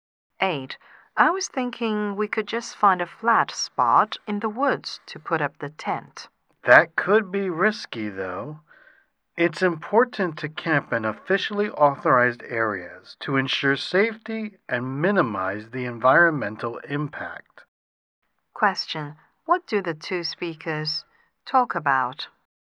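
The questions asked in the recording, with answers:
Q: What do the two speakers talk about?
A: Where to put up the tent when camping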